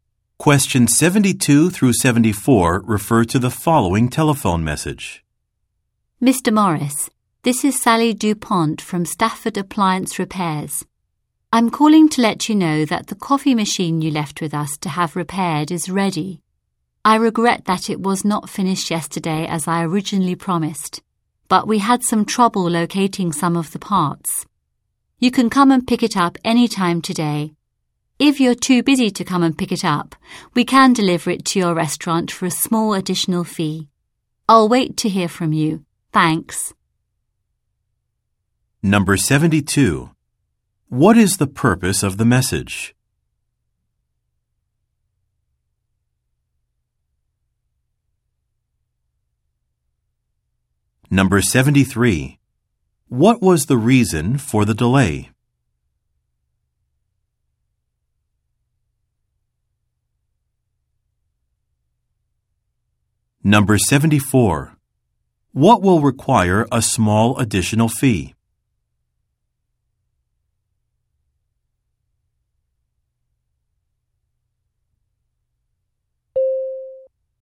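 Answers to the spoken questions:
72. To say that his repaired coffee machine is ready
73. Trouble locating some of the parts
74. Delivering the machine to his restaurant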